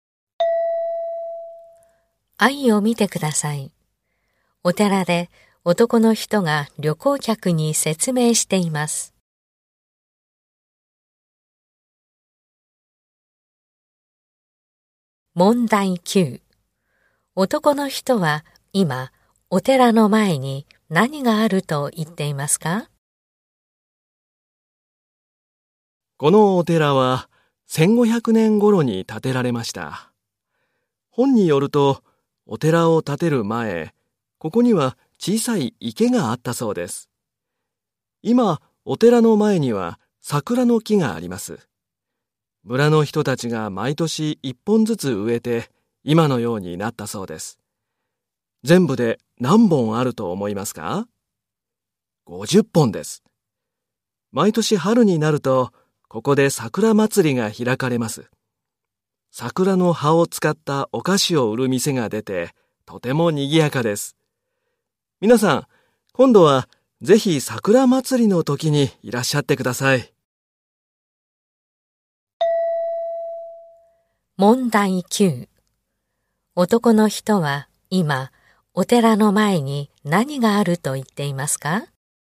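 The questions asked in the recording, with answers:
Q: 男の人は今お寺の前に何があると言っていますか?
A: 桜の木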